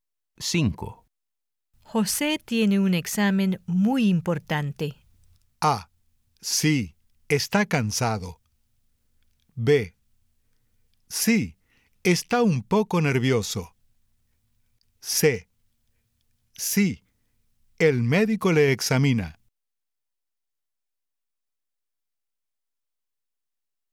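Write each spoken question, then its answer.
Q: José tiene un examen muy importante.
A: B: Sí, está un poco nervioso.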